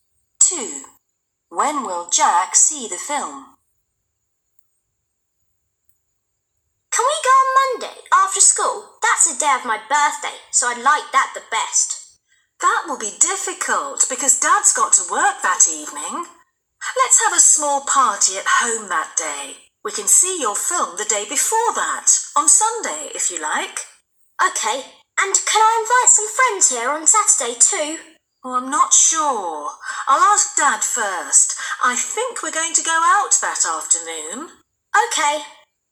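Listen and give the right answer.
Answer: on Sunday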